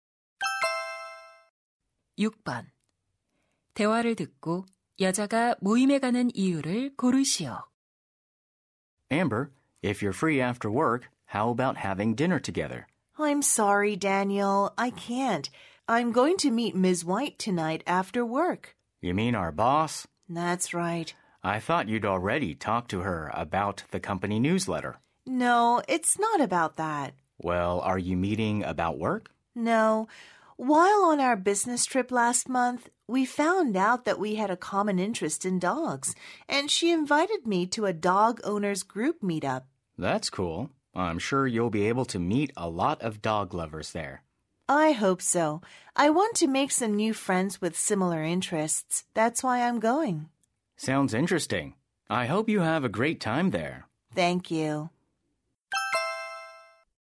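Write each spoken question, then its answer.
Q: 대화를 듣고 여자가 모임에 가는 이유를 고르시오.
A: 비슷한 관심사를 가진 새 친구를 사귀려고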